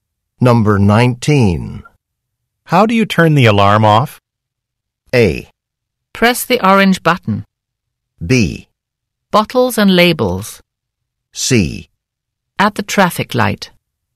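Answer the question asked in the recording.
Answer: A: Press the orange button.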